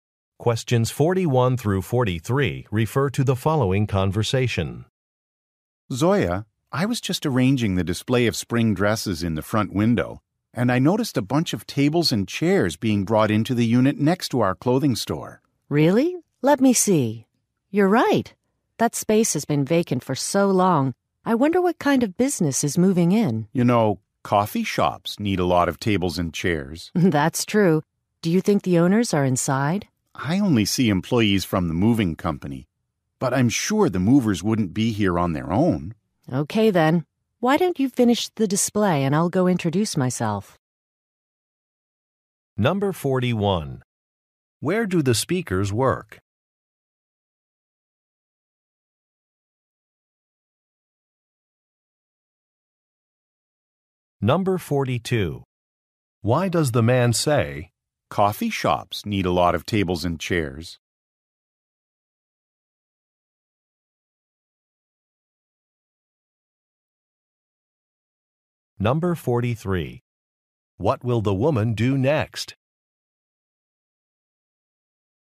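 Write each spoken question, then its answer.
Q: Where do the speakers work?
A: At a clothing store

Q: coffee shops need a lot of tables and chairs?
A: To suggest a coffee shop is moving in

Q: What will the woman do next?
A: Introduce herself to the new neighbors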